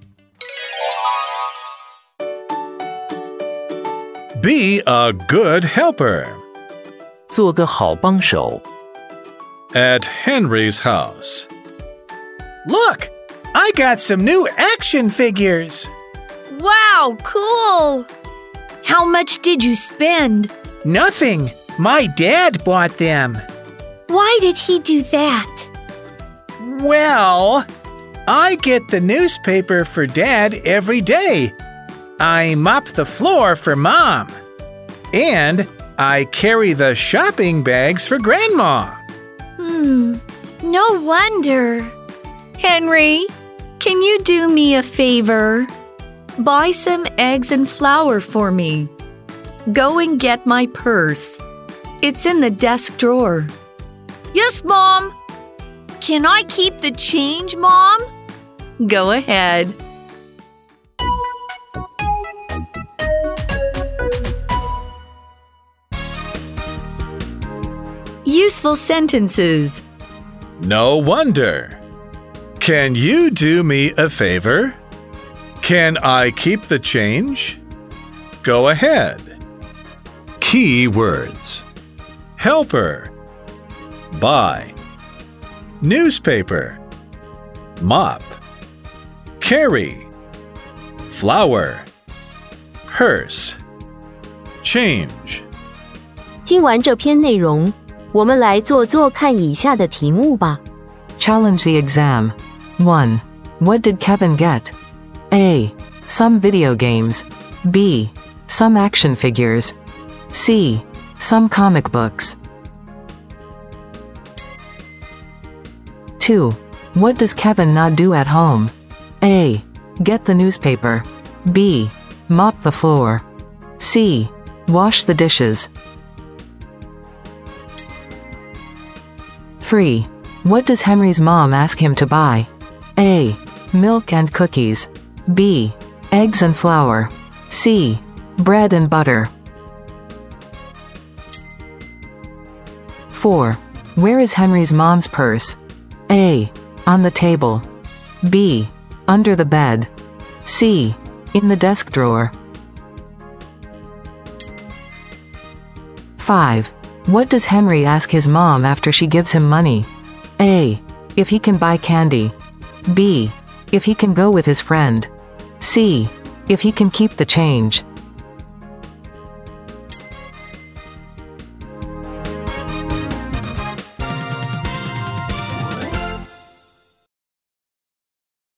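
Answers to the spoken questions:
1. B: Some action figures.
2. C: Wash the dishes.
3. B: Eggs and flour.
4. C: In the desk drawer.
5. C: If he can keep the change.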